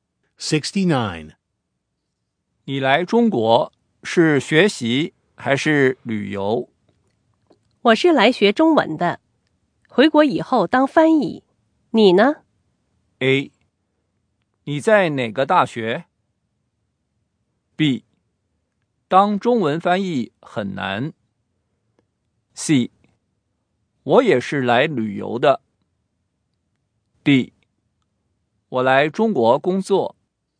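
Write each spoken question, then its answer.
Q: 我是来学中文的,回国以后当翻译。你呢?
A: D: 我来中国工作。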